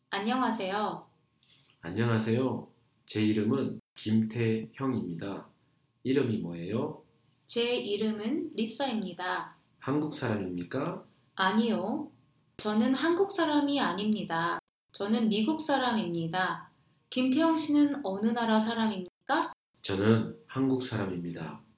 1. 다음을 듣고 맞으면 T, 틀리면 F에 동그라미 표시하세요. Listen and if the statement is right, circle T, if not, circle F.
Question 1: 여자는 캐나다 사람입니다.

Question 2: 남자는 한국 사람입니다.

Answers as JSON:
{"1": "F", "2": "T"}